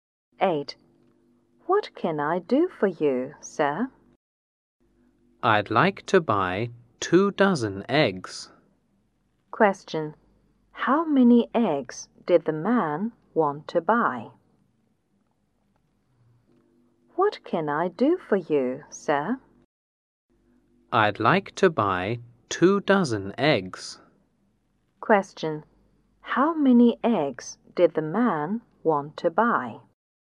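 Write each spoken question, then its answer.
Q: How many eggs did the man want to buy?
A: 24 eggs (2 dozen)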